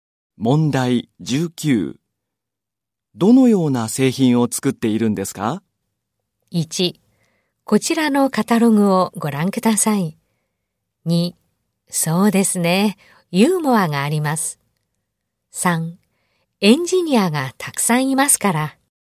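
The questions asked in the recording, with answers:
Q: どのような製品を作っているんですか?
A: 1: こちらのカタログをご覧ください。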